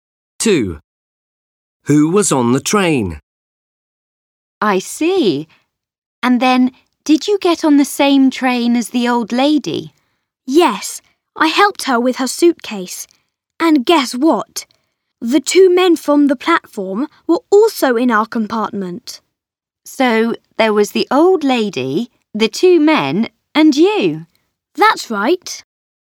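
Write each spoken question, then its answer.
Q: Who was on the train?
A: The old lady, the two men and Max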